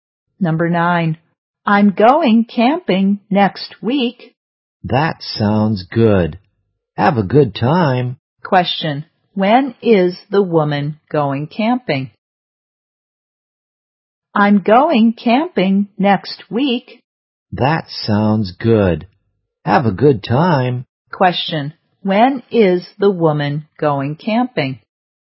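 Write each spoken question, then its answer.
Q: When is the woman going camping?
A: Next week.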